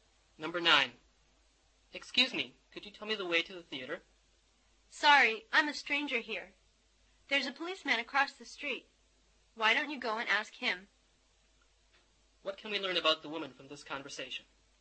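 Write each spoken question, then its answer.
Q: What can we learn about the woman from this conversation?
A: She is a stranger there.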